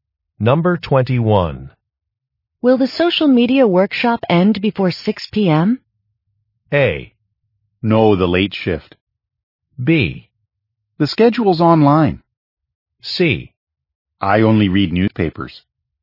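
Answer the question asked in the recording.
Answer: B: The schedule's online.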